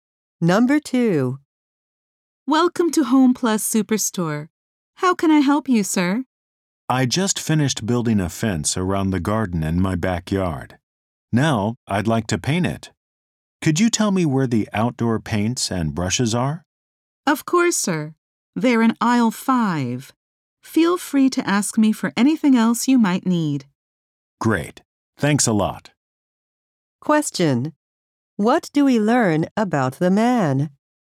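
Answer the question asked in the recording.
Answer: He built a fence and wants to paint it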